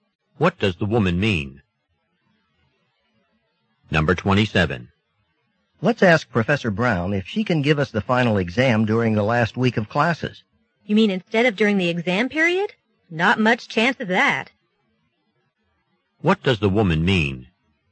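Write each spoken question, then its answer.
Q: What does the woman mean?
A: The professor probably won't agree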